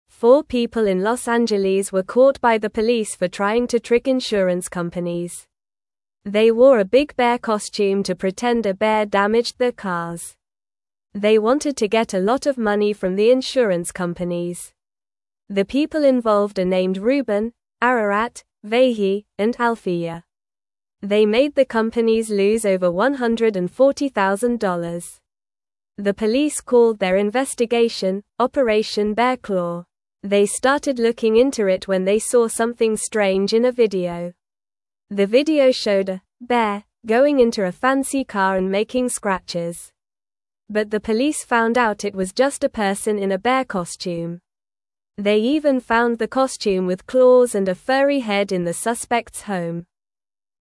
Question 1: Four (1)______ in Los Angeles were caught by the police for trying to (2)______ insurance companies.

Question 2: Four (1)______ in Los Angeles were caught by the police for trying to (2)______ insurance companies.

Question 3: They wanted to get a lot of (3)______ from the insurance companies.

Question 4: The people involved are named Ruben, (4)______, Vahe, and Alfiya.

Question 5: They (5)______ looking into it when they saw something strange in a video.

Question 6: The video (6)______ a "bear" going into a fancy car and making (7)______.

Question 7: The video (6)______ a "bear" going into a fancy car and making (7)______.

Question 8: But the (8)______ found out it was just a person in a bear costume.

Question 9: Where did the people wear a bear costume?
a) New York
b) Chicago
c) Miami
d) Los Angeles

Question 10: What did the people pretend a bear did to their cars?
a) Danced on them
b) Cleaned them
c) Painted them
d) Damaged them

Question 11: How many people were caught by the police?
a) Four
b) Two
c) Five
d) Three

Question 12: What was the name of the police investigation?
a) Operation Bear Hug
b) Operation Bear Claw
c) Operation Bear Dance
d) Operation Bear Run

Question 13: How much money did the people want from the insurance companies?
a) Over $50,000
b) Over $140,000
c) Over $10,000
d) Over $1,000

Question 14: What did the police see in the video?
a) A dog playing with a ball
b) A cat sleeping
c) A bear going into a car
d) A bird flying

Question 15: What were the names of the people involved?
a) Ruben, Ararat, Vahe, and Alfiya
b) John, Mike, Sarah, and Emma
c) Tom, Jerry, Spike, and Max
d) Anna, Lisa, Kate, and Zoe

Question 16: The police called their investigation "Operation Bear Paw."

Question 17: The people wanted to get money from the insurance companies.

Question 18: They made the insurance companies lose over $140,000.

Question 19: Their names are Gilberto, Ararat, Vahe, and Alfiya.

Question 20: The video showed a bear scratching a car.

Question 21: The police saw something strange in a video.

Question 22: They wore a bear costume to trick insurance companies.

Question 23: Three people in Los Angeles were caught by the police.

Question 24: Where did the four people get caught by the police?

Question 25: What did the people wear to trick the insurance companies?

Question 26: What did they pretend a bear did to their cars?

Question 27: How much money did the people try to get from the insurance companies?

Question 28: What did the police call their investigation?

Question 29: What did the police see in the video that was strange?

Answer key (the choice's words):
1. people
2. trick
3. money
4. Ararat
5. started
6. showed
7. scratches
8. police
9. Los Angeles
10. Damaged them
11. Four
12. Operation Bear Claw
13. Over $140,000
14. A bear going into a car
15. Ruben, Ararat, Vahe, and Alfiya
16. False
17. True
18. True
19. False
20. False
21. True
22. True
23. False
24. They got caught in Los Angeles.
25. They wore a big bear costume.
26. They pretended a bear scratched their cars.
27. They tried to get over $140,000.
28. They called it "Operation Bear Claw."
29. They saw a "bear" going into a fancy car.

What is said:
Four people in Los Angeles were caught by the police for trying to trick insurance companies. They wore a big bear costume to pretend a bear damaged their cars. They wanted to get a lot of money from the insurance companies. The people involved are named Ruben, Ararat, Vahe, and Alfiya. They made the companies lose over $140,000.
The police called their investigation "Operation Bear Claw." They started looking into it when they saw something strange in a video. The video showed a "bear" going into a fancy car and making scratches. But the police found out it was just a person in a bear costume. They even found the costume with claws and a furry head in the suspects' home.

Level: Level 1